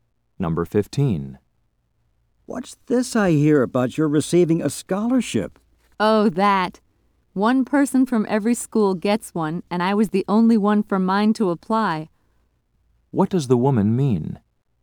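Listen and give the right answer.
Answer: She got the scholarship because she was the only applicant.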